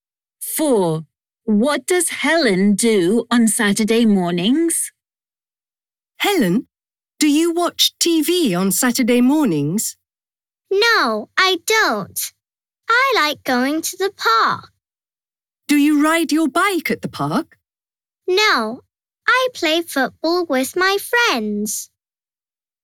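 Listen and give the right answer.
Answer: She plays football with her friends in the park.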